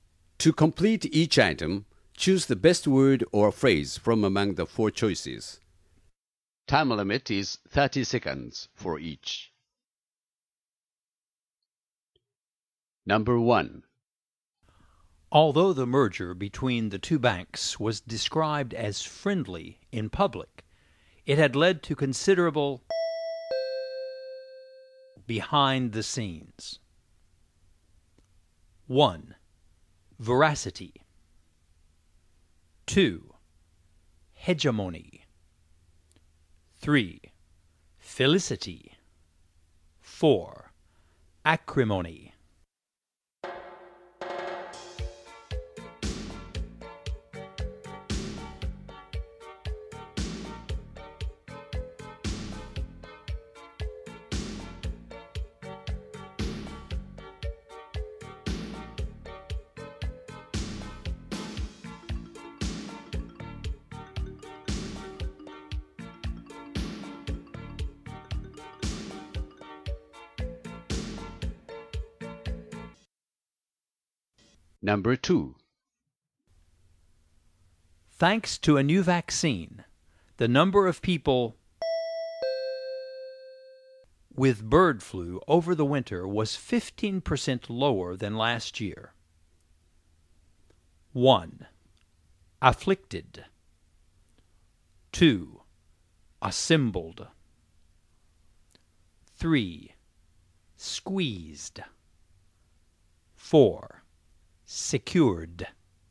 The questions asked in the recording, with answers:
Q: Although the merger between the two banks was described as friendly in public, it had led to considerable behind the scenes.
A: For number one, you should choose 4, acrimony.

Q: Thanks to a new vaccine, the number of people with bird flu over the winter was 15% lower than last year.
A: And for number two, you should choose 1, afflicted.